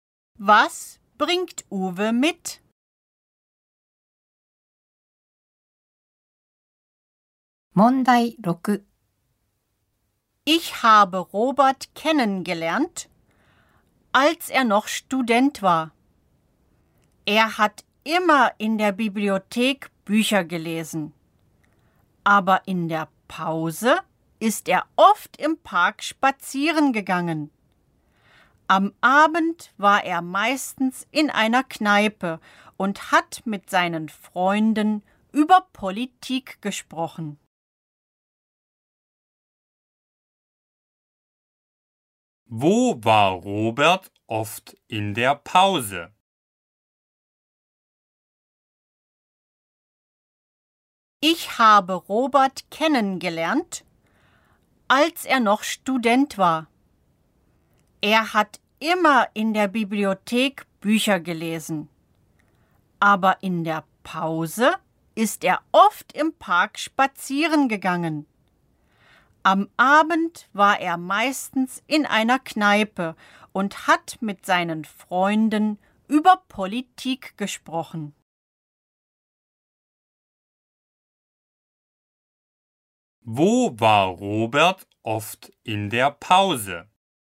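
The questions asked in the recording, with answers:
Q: Wo war Robert oft in der Pause?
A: Im Park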